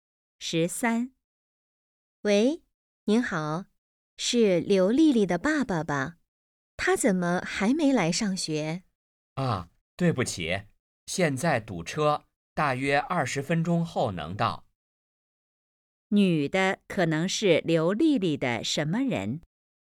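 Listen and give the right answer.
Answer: 老师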